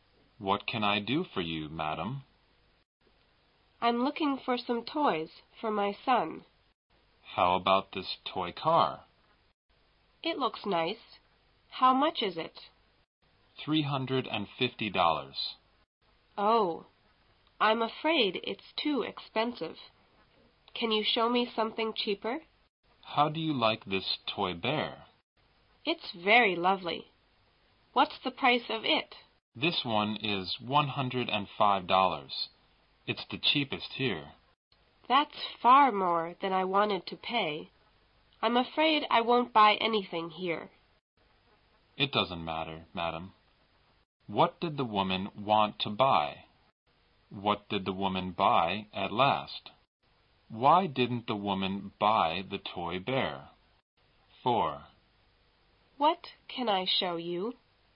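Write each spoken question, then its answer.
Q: What did the woman want to buy?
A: Toys for her son

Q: What did the woman buy at last?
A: Nothing

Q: Why didn't the woman buy the toy bear?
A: It was too expensive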